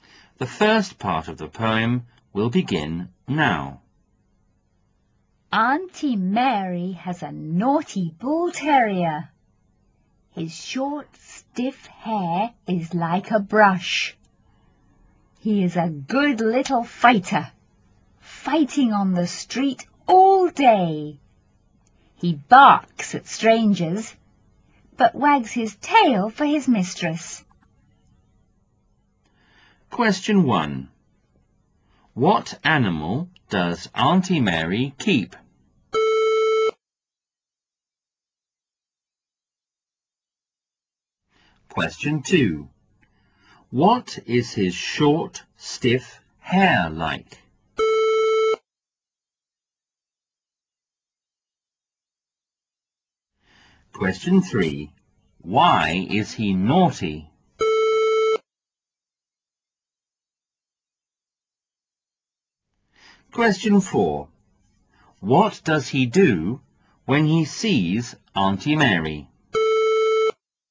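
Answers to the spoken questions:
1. A bull terrier
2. Like a brush
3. He fights on the street all day
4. He wags his tail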